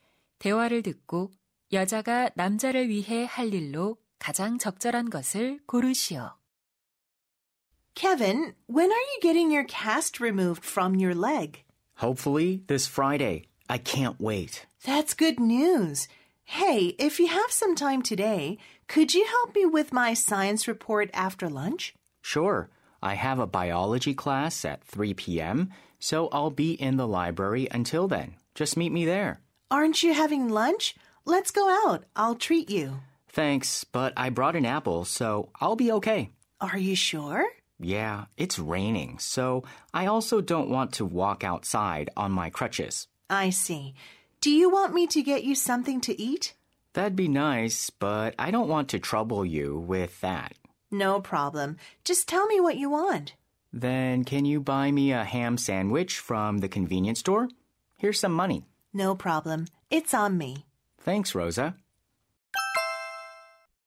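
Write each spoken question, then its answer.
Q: 대화를 듣고 여자가 남자를 위해 할 일로 가장 적절한 것을 고르시오.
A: 햄 샌드위치 사 오기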